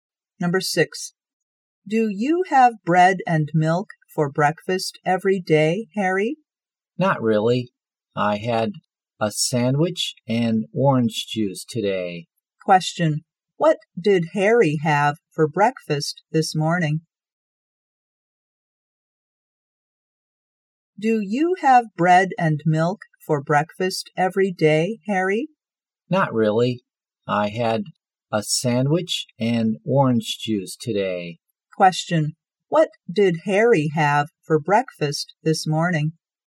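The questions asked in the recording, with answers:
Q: what did Harry have for breakfast this morning?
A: A sandwich and orange juice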